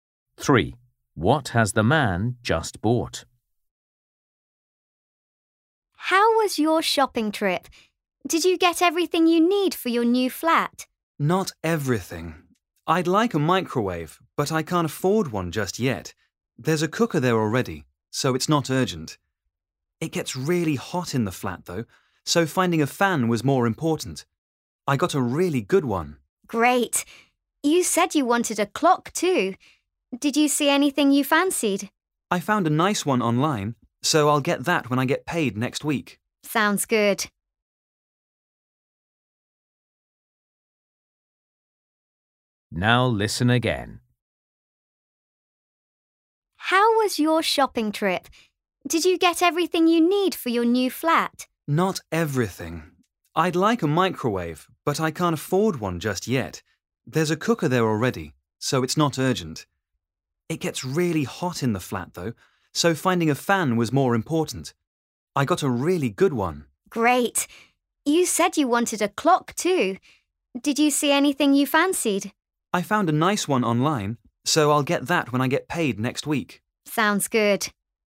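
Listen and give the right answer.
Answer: A fan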